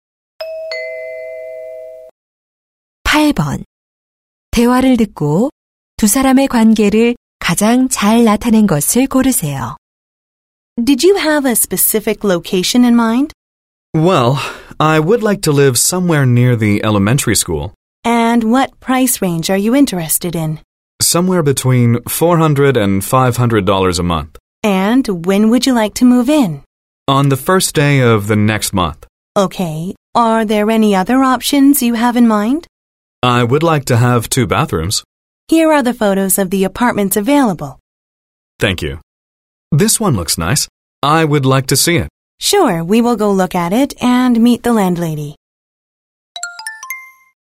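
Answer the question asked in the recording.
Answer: 부동산 중개인 - 고객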